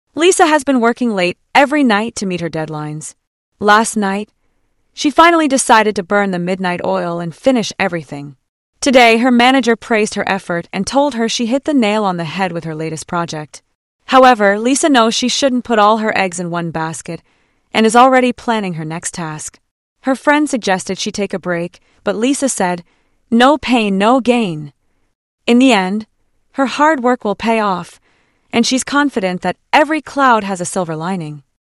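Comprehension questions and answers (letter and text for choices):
Listen and Answer:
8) What is Lisa's attitude toward hard work and challenges, based on the phrases used in the audio?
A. Lisa believes in balancing her work and personal life.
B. Lisa sees hard work as essential for success and remains optimistic in difficult situations.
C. Lisa prefers to focus on one project at a time and avoids taking risks.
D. Lisa feels frustrated and overwhelmed by her responsibilities.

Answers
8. B. Lisa sees hard work as essential for success and remains optimistic in difficult situations.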